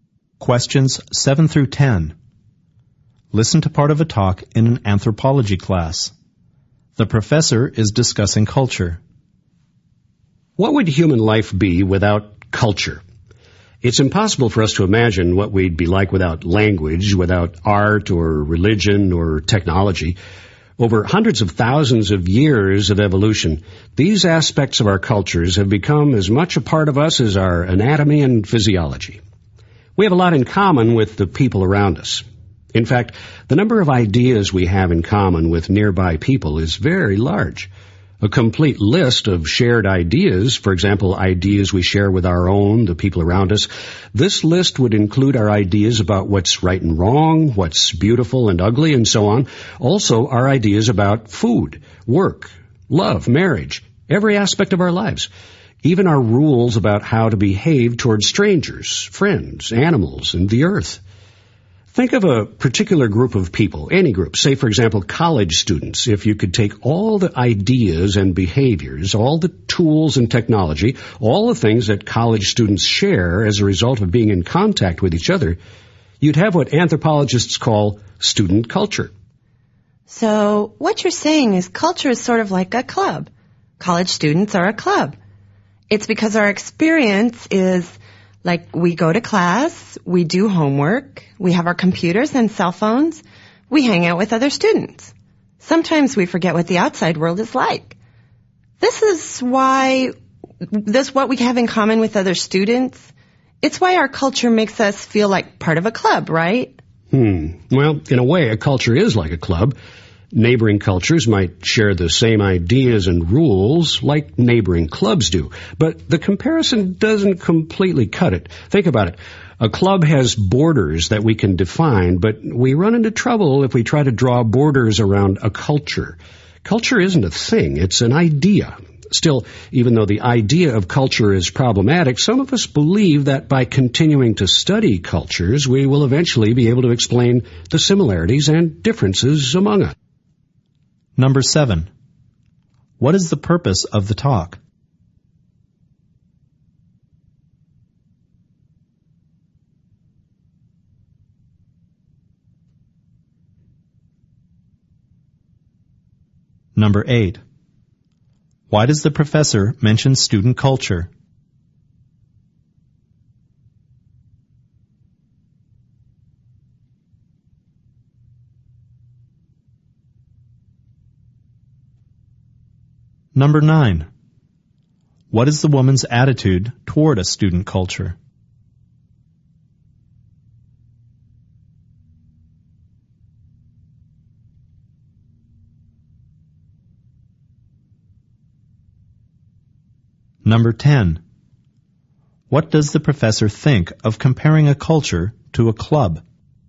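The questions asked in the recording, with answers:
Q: What is the purpose of the talk?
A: To explain the idea of culture

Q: Why does the professor mention student culture?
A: As an example of a culture formed by shared ideas and behaviors

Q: What is the woman's attitude toward a student culture?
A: She thinks it is like a club

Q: What does the professor think of comparing a culture to a club?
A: It is partly right but doesn't completely work, because a culture has no clear borders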